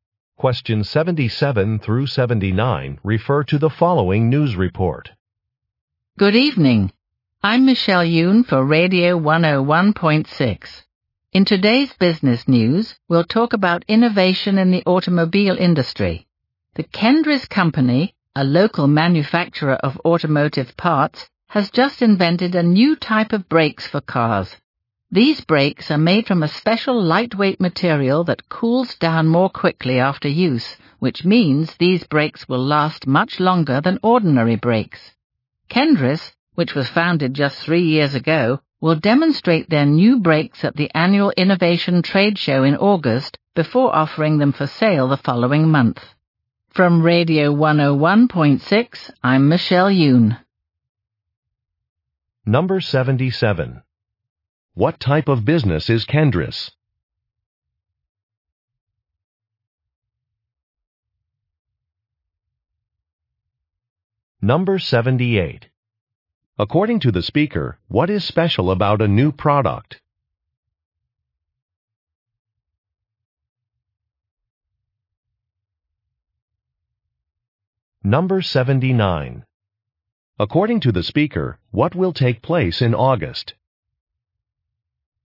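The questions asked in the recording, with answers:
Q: What type of business is Kendris?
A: An automotive parts manufacturer

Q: According to the speaker, what is special about a new product?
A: The brakes last much longer than ordinary brakes

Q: According to the speaker, what will take place in August?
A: The annual Innovation Trade Show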